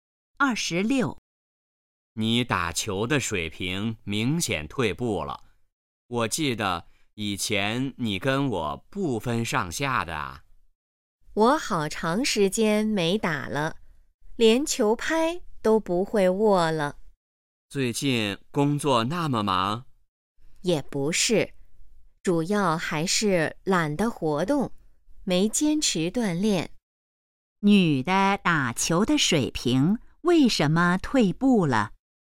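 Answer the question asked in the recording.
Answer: 懒得活动,没坚持锻炼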